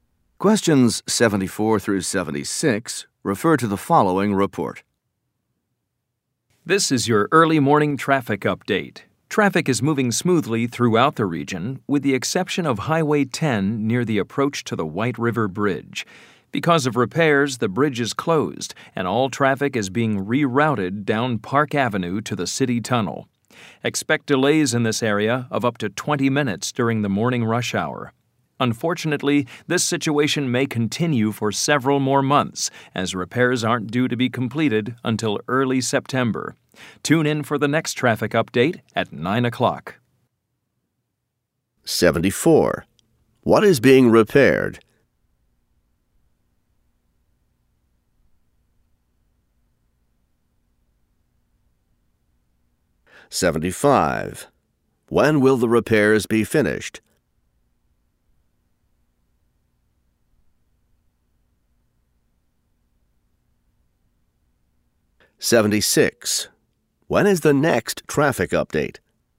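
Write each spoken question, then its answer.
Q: What is being repaired?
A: The White River Bridge

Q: When will the repairs be finished?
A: Early September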